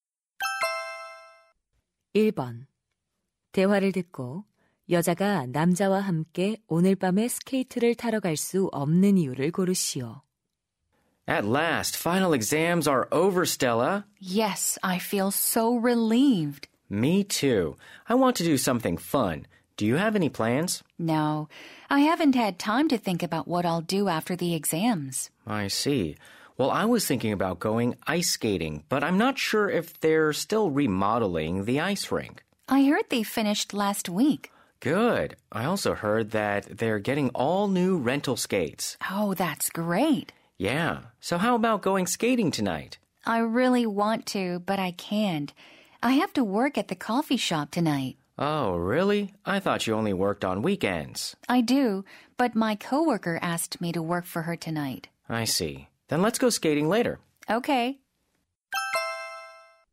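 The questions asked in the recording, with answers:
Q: 대화를 듣고 여자가 남자와 함께 오늘 밤에 스케이트를 타러 갈 수 없는 이유를 고르시오.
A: 동료 대신 커피숍에서 일해야 해서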